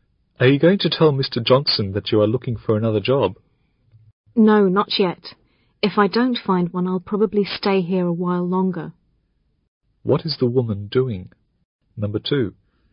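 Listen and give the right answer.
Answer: Looking for another job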